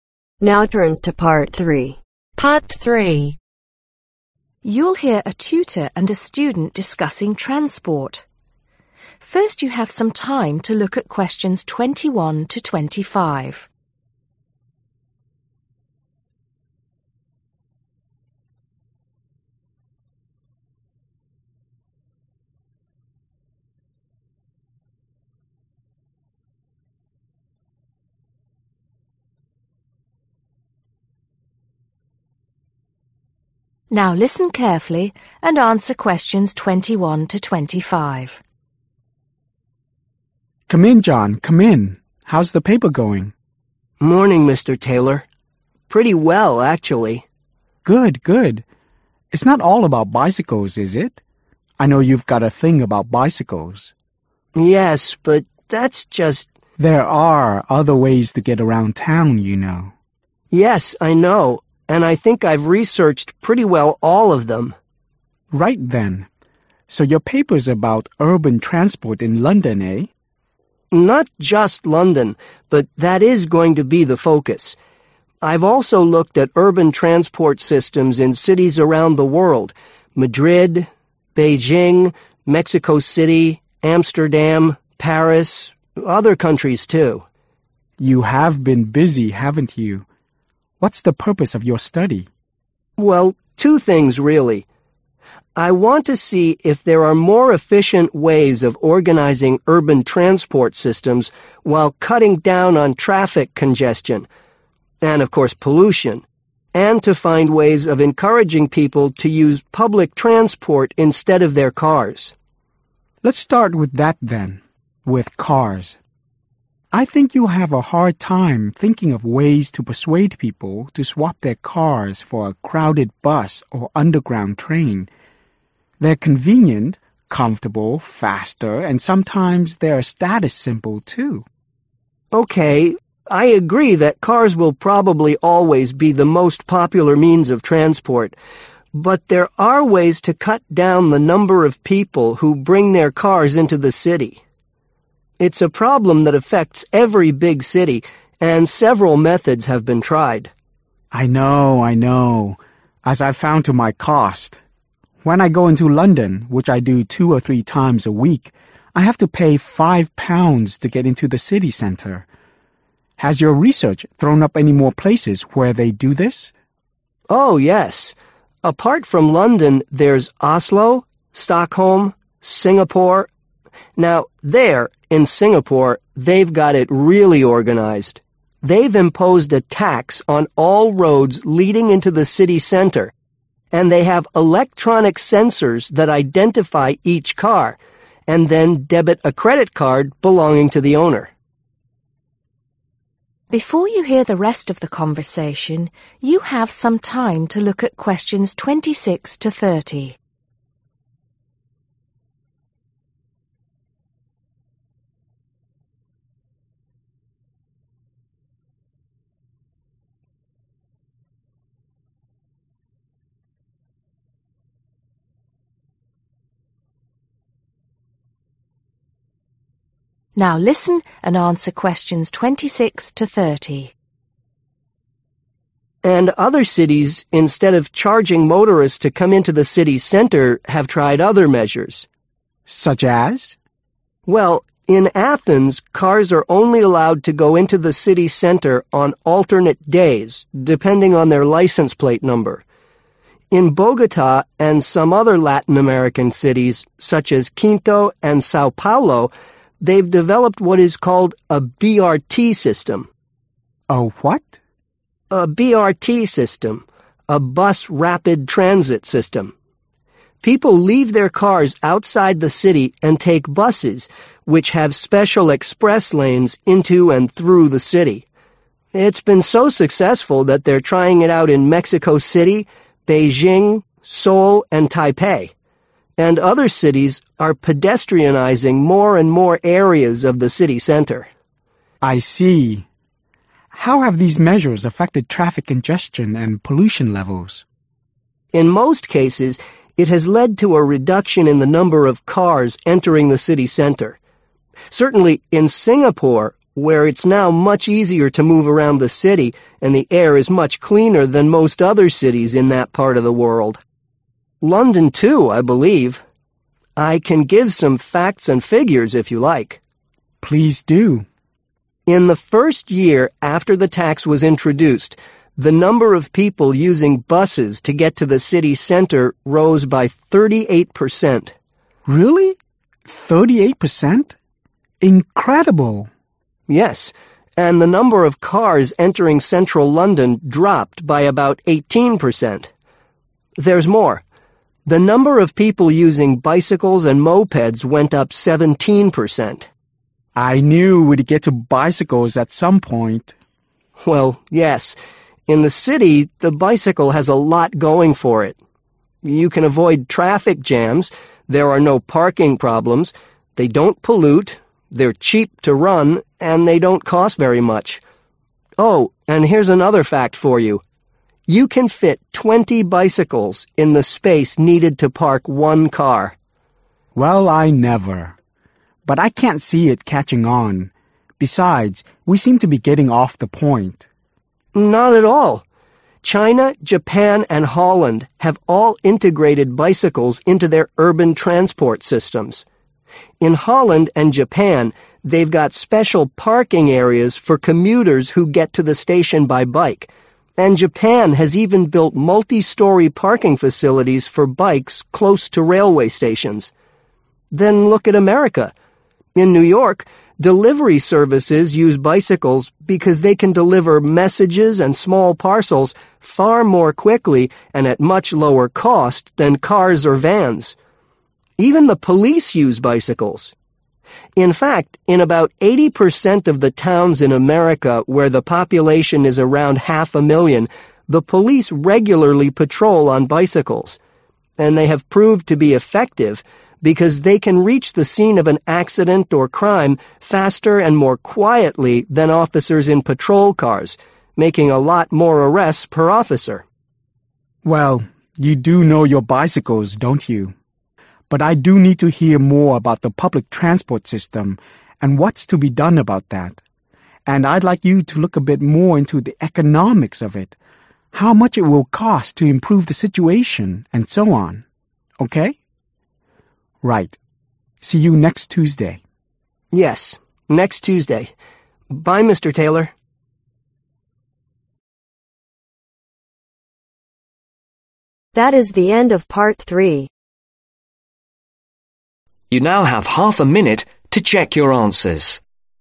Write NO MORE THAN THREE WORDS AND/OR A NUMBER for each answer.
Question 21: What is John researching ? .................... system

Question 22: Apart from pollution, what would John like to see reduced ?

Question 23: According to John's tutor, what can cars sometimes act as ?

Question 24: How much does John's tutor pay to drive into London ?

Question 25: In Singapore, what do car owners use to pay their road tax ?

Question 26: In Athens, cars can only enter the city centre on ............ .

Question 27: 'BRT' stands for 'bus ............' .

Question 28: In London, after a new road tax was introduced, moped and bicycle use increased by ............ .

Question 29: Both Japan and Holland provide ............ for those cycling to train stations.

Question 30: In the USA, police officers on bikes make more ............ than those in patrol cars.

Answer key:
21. (Urban) Transport
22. (Traffic) Congestion
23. Status Symbol
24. £5/Five Pounds
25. Credit Card
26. Alternate Days
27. Rapid Transit
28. 17%
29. Parking Facilities
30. Arrests